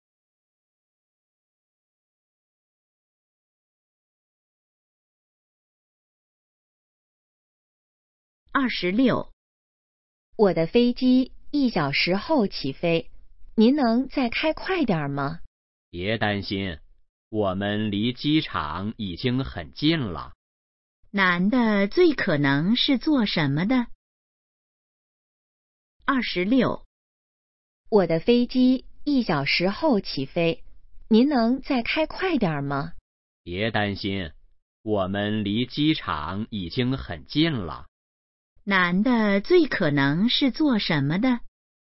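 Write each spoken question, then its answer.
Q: 男的最可能是做什么的?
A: 司机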